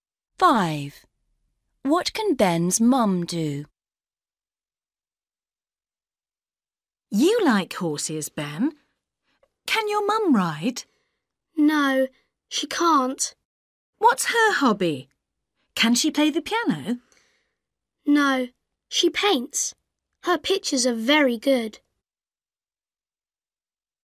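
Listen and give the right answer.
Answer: She can paint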